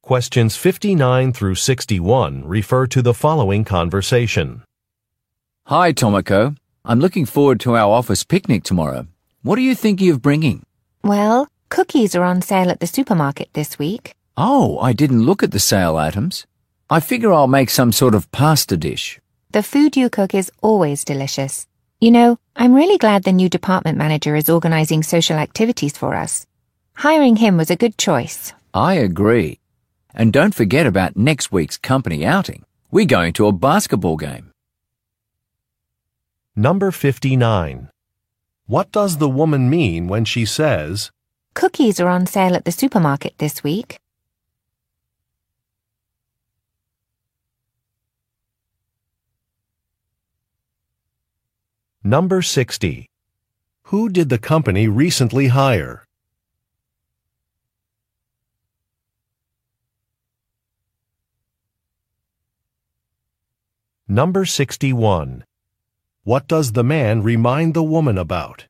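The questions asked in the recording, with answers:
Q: Who did the company recently hire?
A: A new department manager

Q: What does the man remind the woman about?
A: Next week's company outing to a basketball game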